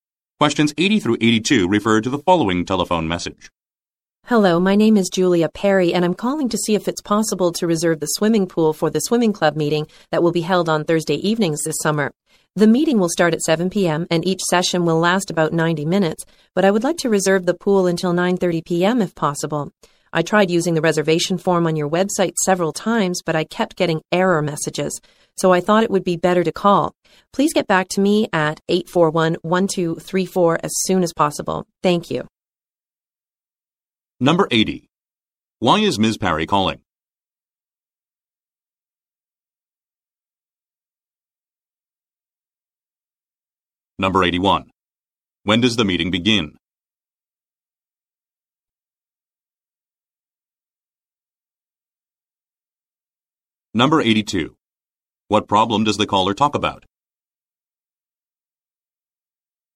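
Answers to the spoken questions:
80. To reserve the swimming pool
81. 7 p.m. on Thursday
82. The website reservation form kept giving error messages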